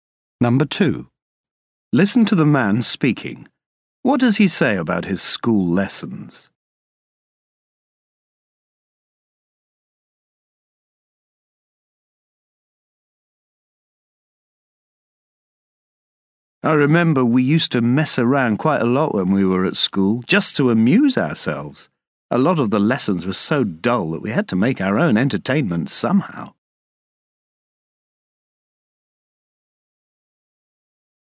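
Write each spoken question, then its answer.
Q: What does he say about his school lessons?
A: Many were so dull that they messed around to amuse themselves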